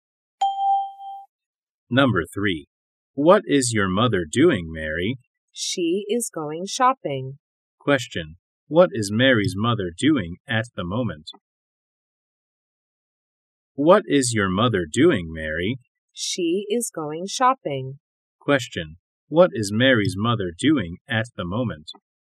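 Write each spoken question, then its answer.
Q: What is Mary's mother doing at the moment?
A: She is going shopping.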